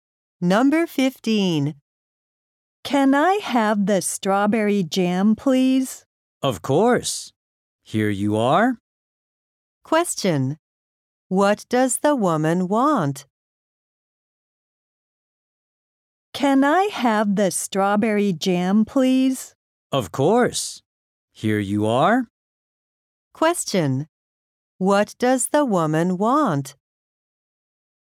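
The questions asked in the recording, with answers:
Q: What does the woman want?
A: The strawberry jam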